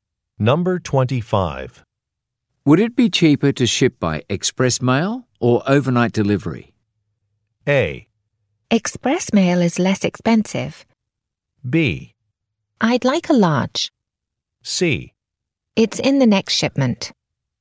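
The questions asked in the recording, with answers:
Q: Would it be cheaper to ship by express mail or overnight delivery?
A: A: Express mail is less expensive.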